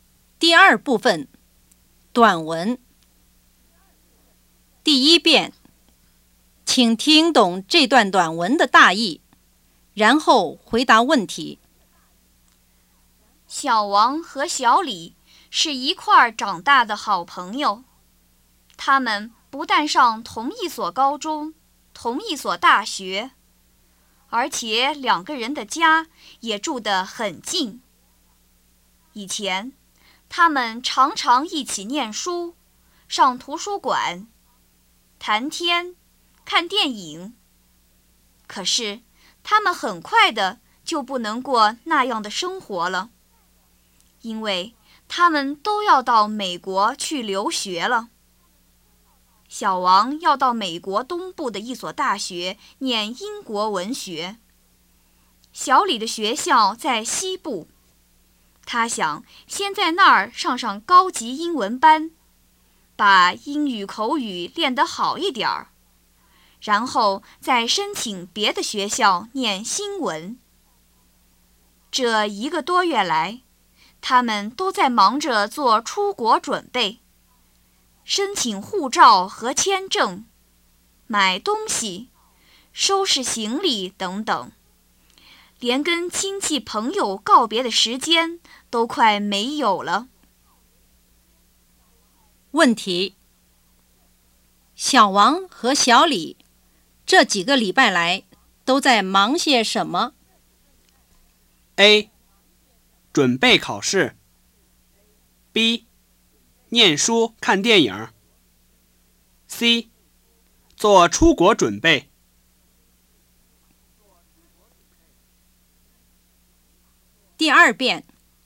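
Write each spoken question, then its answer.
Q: 问题:小王和小李这几个礼拜来都在忙些什么?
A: C: 做出国准备。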